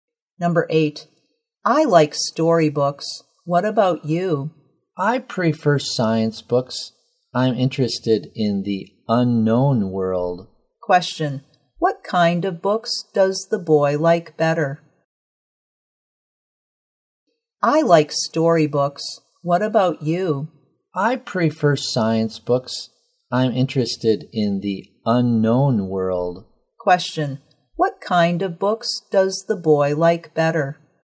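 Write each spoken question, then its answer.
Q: Question, what kind of books does the boy like better?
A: Science books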